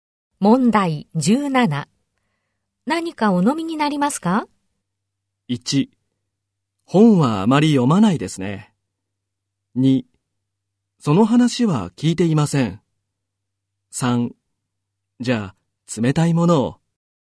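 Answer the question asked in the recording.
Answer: 3: じゃあ、冷たいものを。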